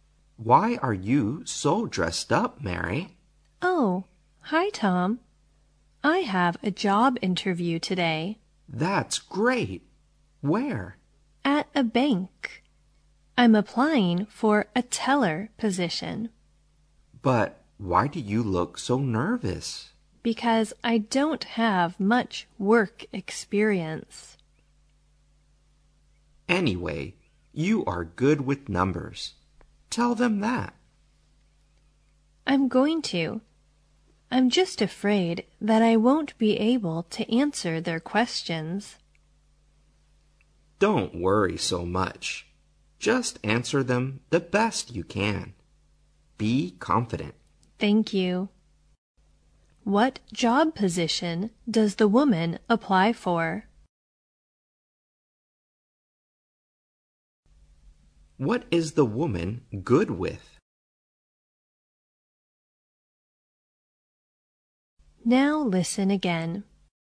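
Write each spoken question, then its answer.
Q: What job position does the woman apply for?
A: A bank teller

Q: What is the woman good with?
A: Numbers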